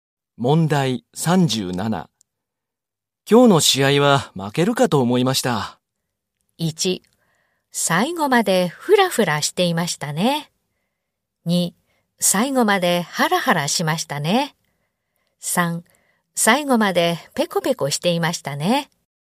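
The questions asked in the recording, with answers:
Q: 今日の試合は負けるかと思いました。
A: 2: 最後までハラハラしましたね。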